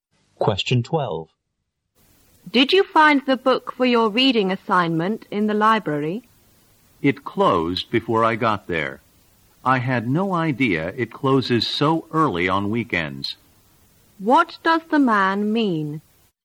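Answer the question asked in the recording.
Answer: He didn't get the book because the library had closed early.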